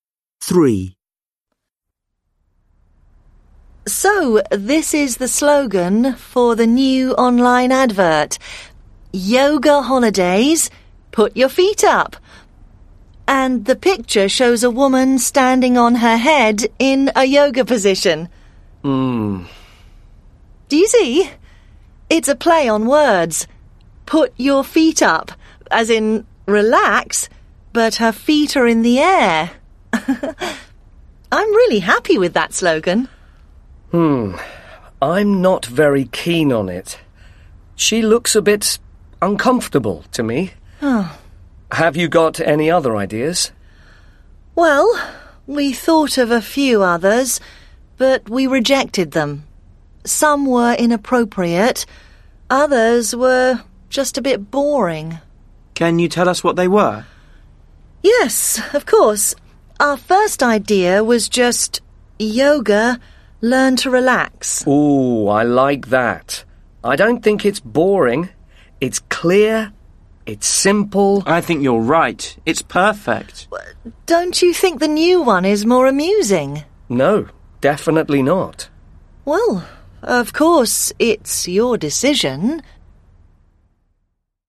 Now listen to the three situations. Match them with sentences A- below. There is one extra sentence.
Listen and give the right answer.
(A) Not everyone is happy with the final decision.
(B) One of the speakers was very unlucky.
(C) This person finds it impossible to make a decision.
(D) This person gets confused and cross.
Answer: (A) Not everyone is happy with the final decision.

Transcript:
Man: How can I turn right when there isn't a road? How can I? I don't understand!
Satnav: Error. You have followed an incorrect route. Recalculating ...
Man: This is impossible. I'm exhausted. I'm turning the satnav off.
Satnav: Goodbye.
3. Executive: So this is the slogan for the new online advert – "Yoga holidays -Put your feet up". And the picture shows a woman standing on her head in a yoga position.
Client 1: Mmm.
Executive: Do you see? It's a play on words. But her feet are in the air. I'm really happy with that slogan.
Client 1: Hmm. I'm not very keen on it. She looks a bit uncomfortable to me. Have you got any other ideas?
Executive: Well, we thought of a few others – but we rejected them. Some were inappropriate – others were just a bit boring.
Client 2: Can you tell us what they were?
Executive: Yes, of course. Our first idea was just "Yoga: learn to relax".
Client 1: Ooh, I like that. I don't think it's boring. It's clear, it's simple.
Client 2: I think you're right. It's perfect.
Executive: Don't you think the new one is more amusing?
Client 1: No, definitely not.
Executive: Well, of course, it's your decision ...

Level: Lớp 10